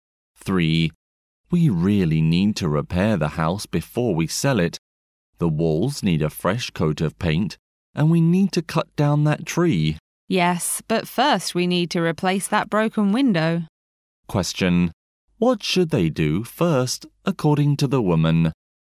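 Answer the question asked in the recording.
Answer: Replace the broken window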